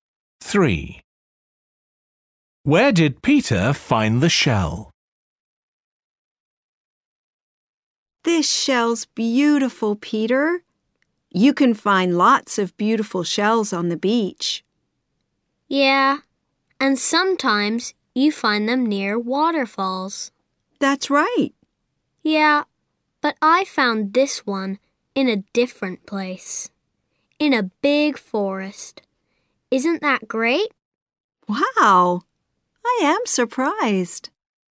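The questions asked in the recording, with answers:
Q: Where did Peter find the shell?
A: In a big forest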